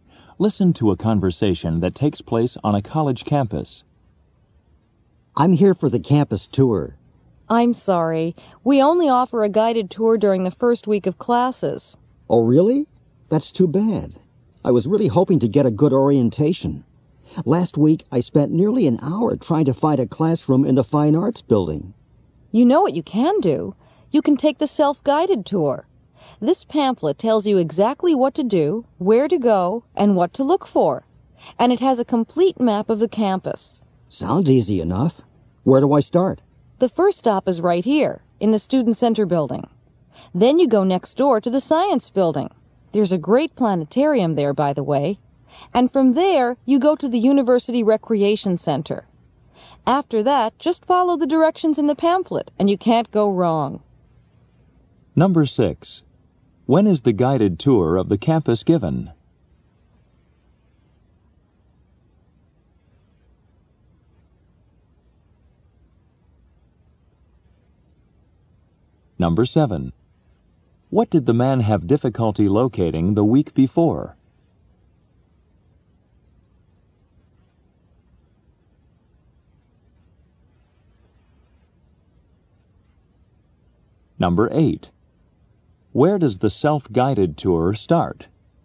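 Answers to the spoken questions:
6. During the first week of classes
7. A classroom in the Fine Arts building
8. In the Student Center building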